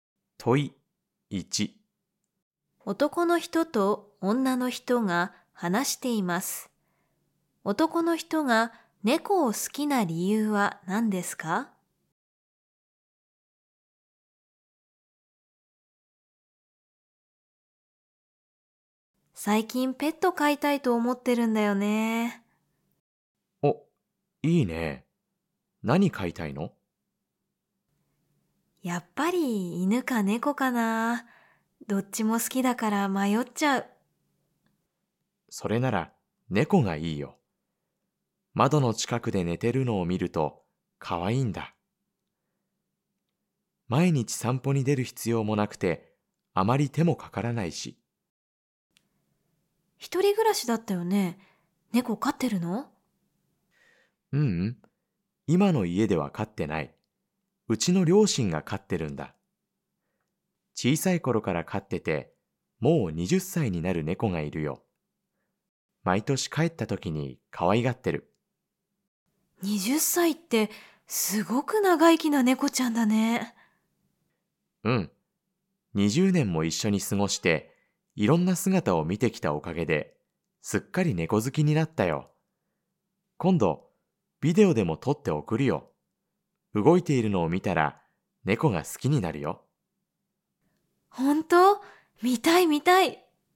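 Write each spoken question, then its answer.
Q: 男の人が猫を好きな理由は何ですか?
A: 20年も一緒に過ごしていろんな姿を見てきたから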